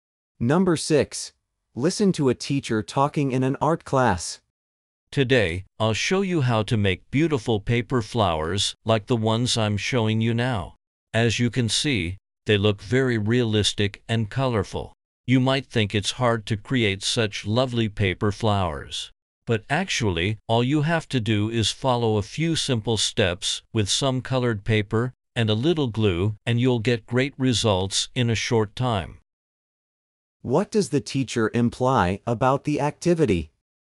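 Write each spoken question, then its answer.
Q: What does the teacher imply about the activity?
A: It is easier than it looks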